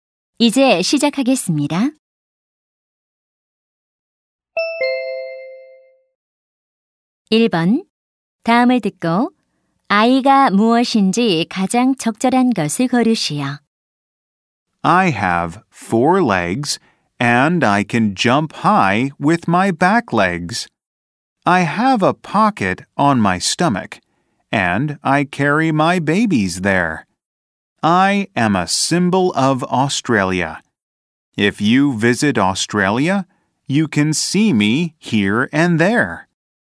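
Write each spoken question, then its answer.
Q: 다음을 듣고 아이가 무엇인지 가장 적절한 것을 고르시오.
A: 캥거루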